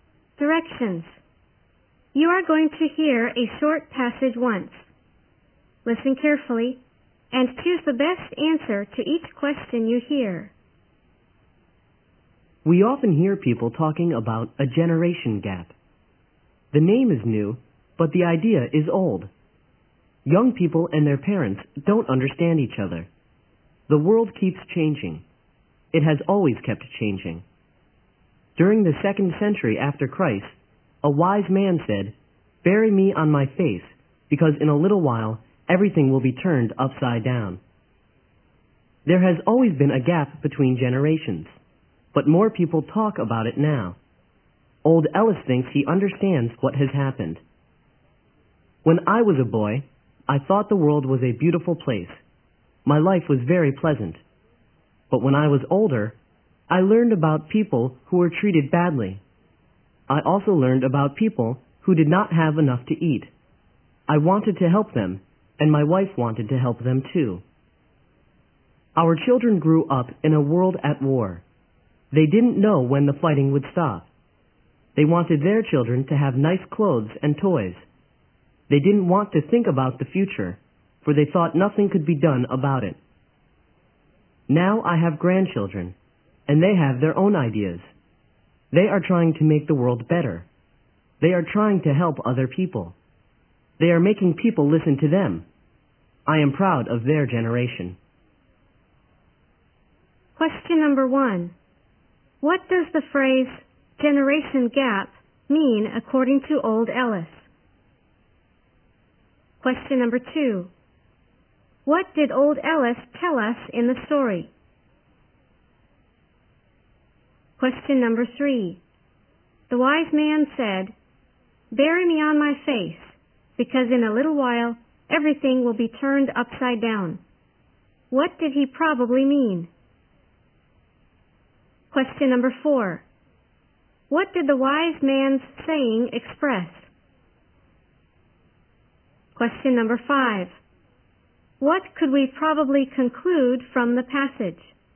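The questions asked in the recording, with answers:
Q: The wise man said, "Bury me on my face, because in a little while everything will be turned upside down." What did he probably mean?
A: The world would change completely soon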